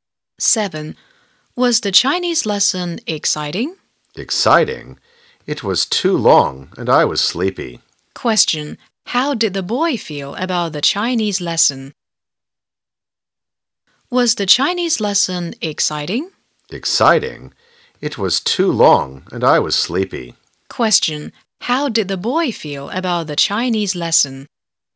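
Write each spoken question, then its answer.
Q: how did the boy feel about the Chinese lesson?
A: Bored; it was too long and he was sleepy.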